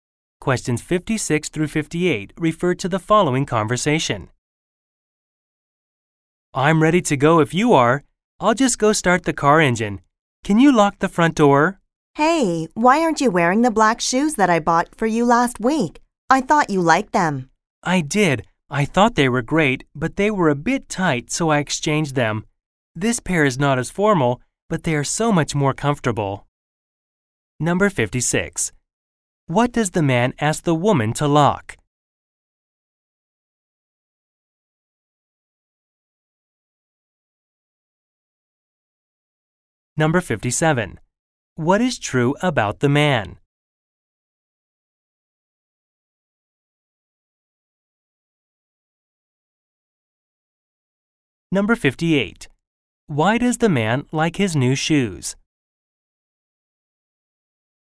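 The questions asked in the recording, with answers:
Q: What does the man ask the woman to lock?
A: The front door

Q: Why does the man like his new shoes?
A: They are more comfortable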